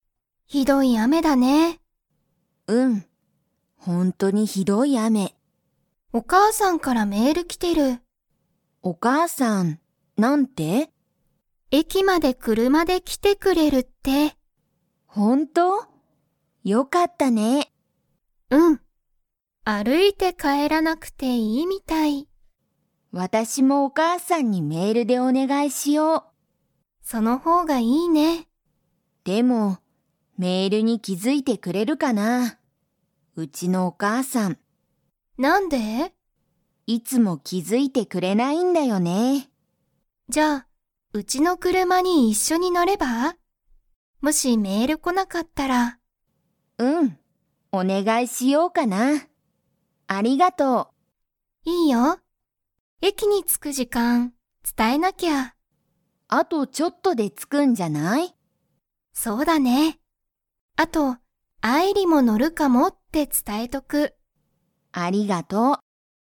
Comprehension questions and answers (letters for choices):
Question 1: ミサキは 。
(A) 歩あるいて帰かえらなきゃいけない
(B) 歩あるいて帰かえらなくていい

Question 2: アイリは、誰だれにメールしてみますか?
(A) お父とうさん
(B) お母かあさん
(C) 先生せんせい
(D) ミサキ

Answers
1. B
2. B

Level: Level 3